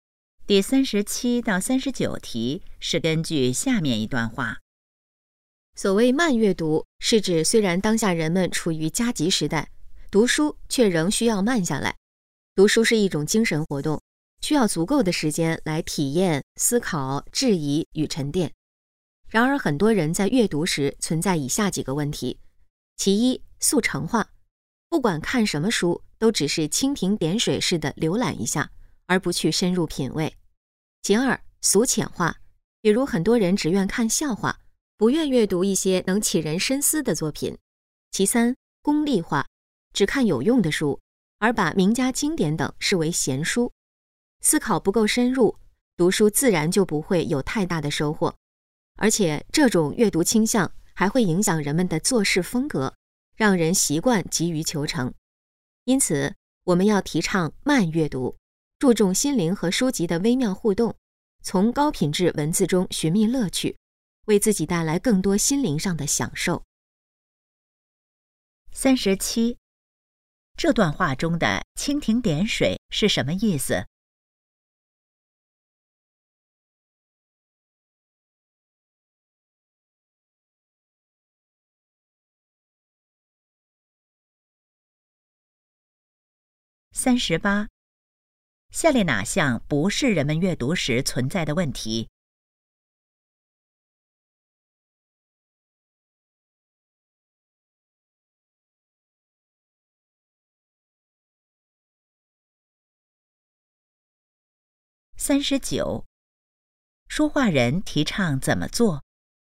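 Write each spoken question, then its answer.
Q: 这段话中的蜻蜓点水是什么意思?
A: 只浏览一下,不深入

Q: 说话人提倡怎么做?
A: 慢阅读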